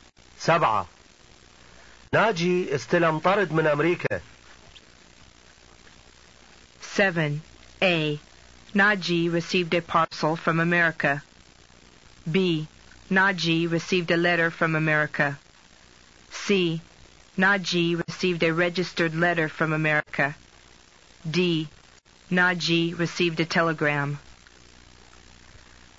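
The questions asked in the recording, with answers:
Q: ناجي استلم طرد من أمريكا.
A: A: Naji received a parcel from America.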